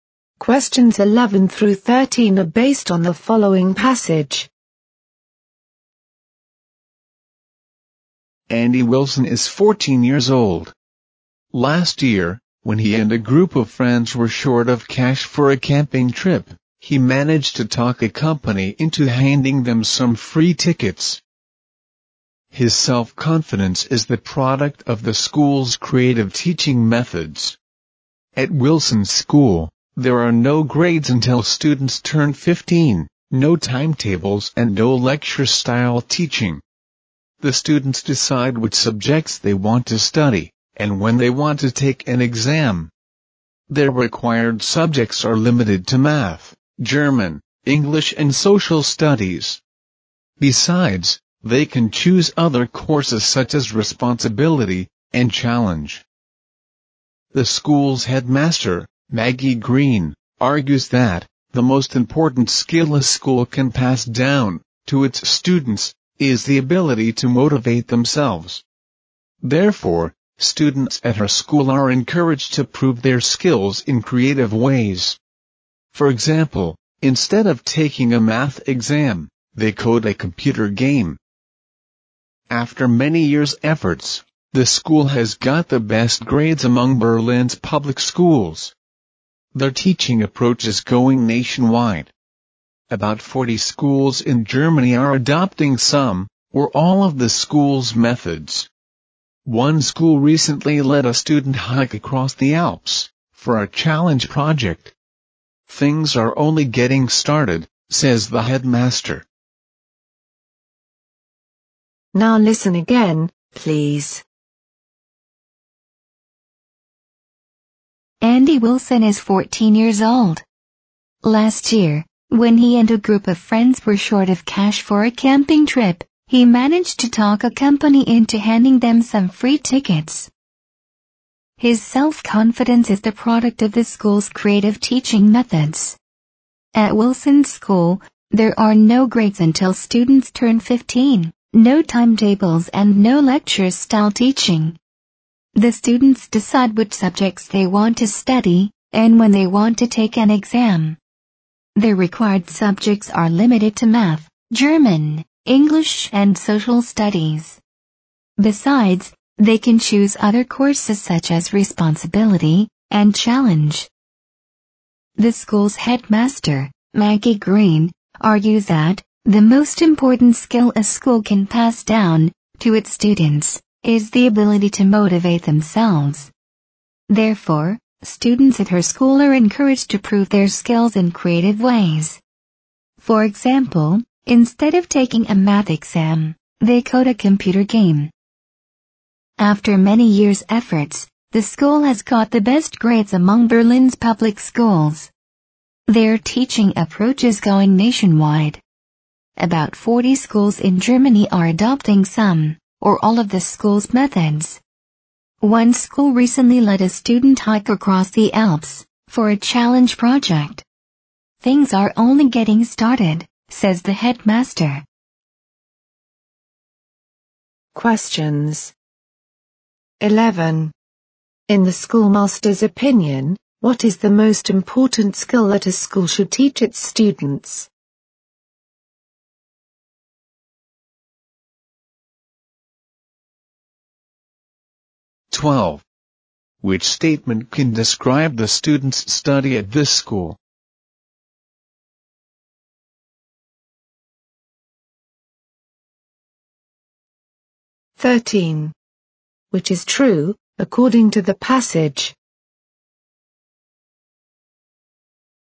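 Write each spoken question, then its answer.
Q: In the schoolmaster's opinion, what is the most important skill that a school should teach its students?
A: The ability to motivate themselves.

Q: Which statement can describe the students' study at this school?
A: Students decide which subjects to study and when to take exams.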